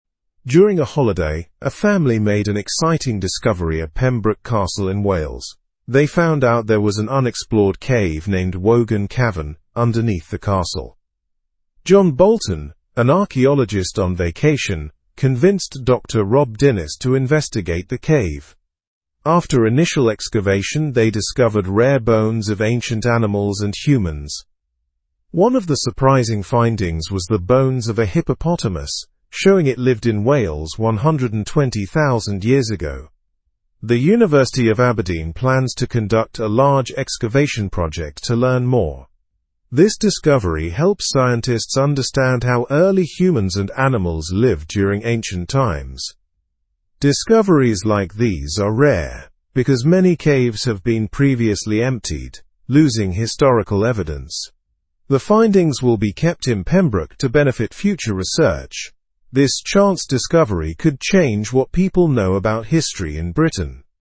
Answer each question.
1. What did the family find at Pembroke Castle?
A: They found an unexplored cave called Wogan Cavern.

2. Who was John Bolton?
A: John Bolton was an archaeologist on vacation.

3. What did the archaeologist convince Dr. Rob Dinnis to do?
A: He convinced Dr. Rob Dinnis to investigate the cave.

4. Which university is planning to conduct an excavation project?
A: The University of Aberdeen.

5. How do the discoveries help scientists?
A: They help scientists understand how early humans and animals lived.

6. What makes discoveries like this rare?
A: Many caves have been previously emptied of historical evidence.

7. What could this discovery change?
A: It could change what people know about history in Britain.

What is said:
During a holiday, a family made an exciting discovery at Pembroke Castle in Wales. They found out there was an unexplored cave named Wogan Cavern underneath the castle. John Bolton, an archaeologist on vacation, convinced Dr. Rob Dinnis to investigate the cave. After initial excavation, they discovered rare bones of ancient animals and humans.
One of the surprising findings was the bones of a hippopotamus, showing it lived in Wales 120,000 years ago. The University of Aberdeen plans to conduct a large excavation project to learn more. This discovery helps scientists understand how early humans and animals lived during ancient times.
Discoveries like these are rare because many caves have been previously emptied, losing historical evidence. The findings will be kept in Pembroke to benefit future research. This chance discovery could change what people know about history in Britain.

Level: Level 2